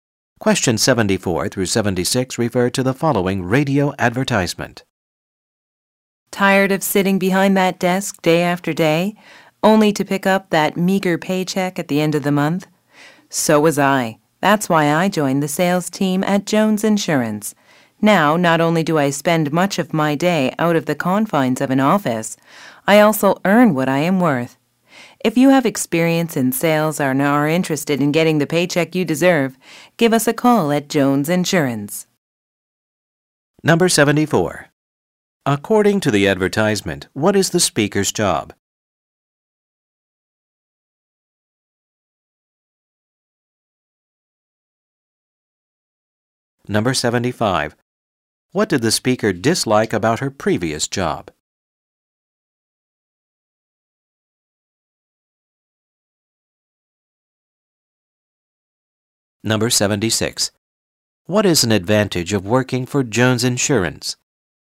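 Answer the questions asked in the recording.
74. Insurance salesperson
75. Sitting behind a desk and the low pay
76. Earning what you are worth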